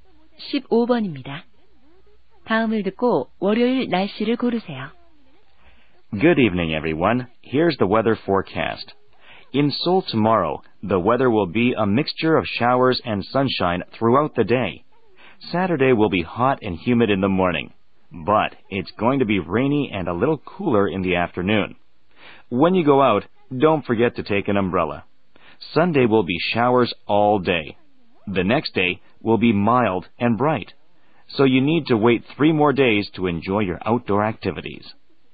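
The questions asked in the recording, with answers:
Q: 다음을 듣고 월요일 날씨를 고르세요.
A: 온화하고 맑음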